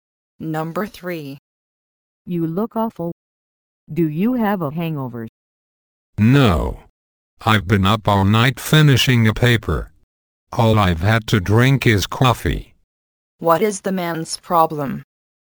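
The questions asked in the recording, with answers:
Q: What is the man's problem?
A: He stayed up all night finishing a paper and is tired.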